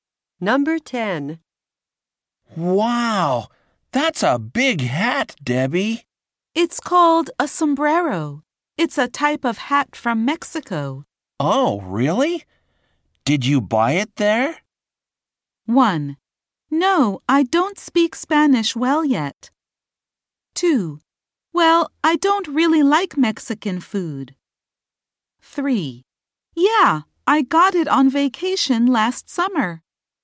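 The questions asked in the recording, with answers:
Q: Oh, really? Did you buy it there?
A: 3: Yeah, I got it on vacation last summer.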